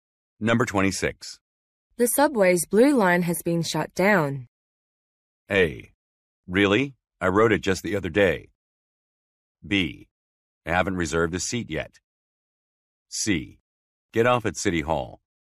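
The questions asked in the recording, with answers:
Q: The subway's blue line has been shut down.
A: A: Really? I rode it just the other day.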